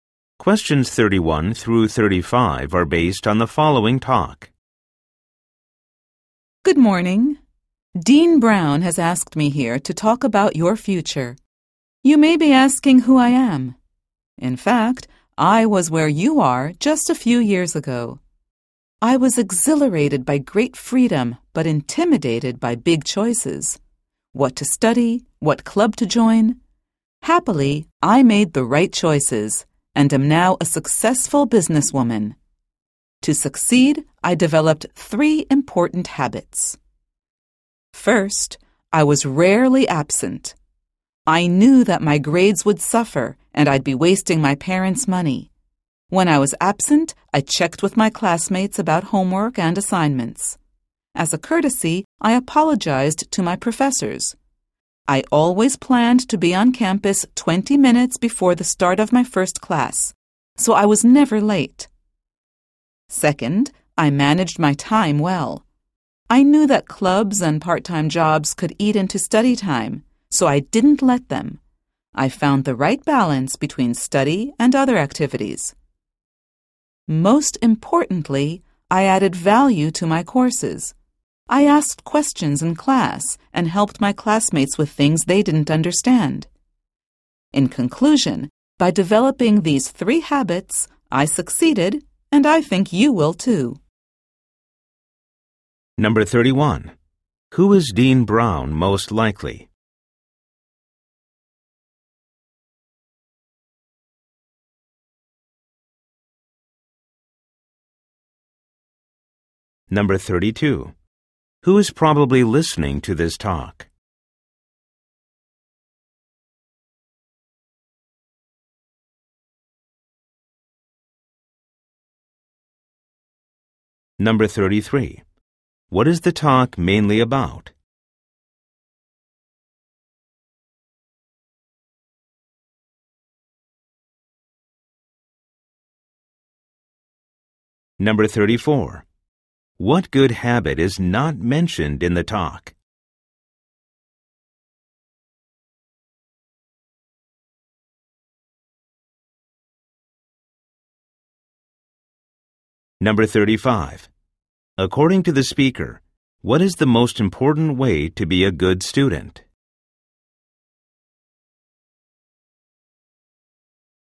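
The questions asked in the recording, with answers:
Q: Who is Dean Brown most likely?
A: A university dean

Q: Who is probably listening to this talk?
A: New university students

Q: What is the talk mainly about?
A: Habits for succeeding as a student

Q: According to the speaker, what is the most important way to be a good student?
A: Add value to your courses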